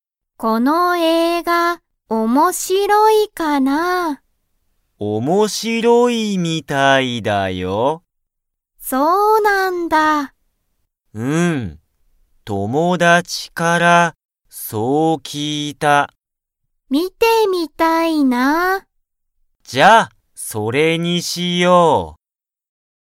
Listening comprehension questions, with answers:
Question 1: サキとユタカはその映画(えいが)を観(み)ますか?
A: はい

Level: Level 1